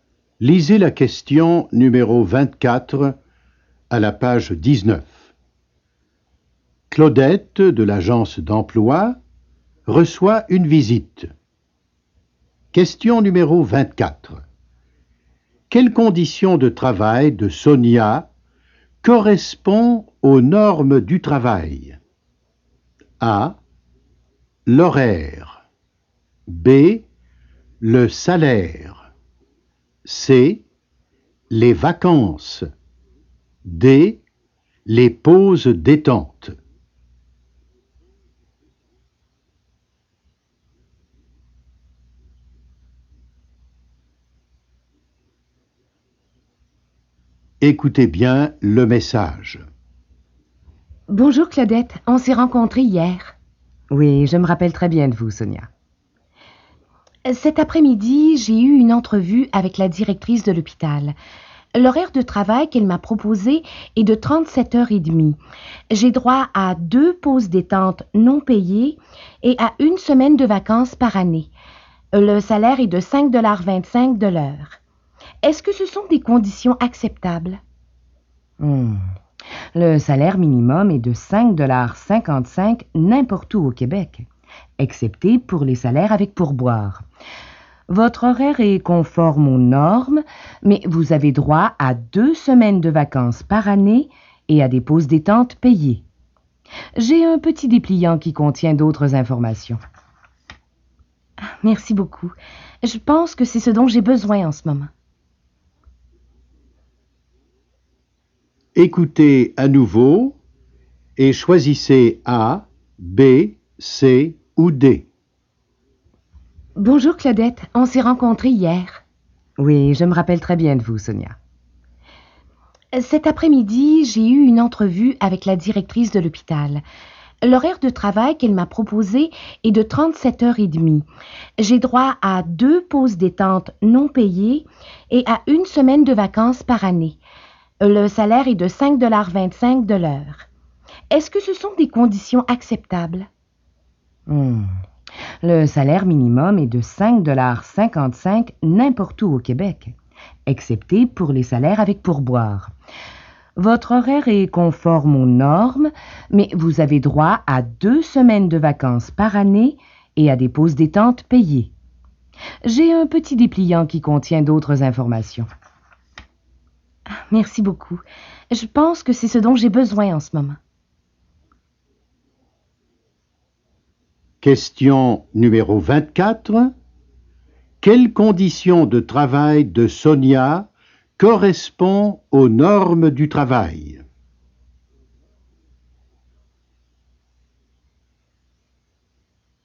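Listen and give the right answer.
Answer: A: L'horaire.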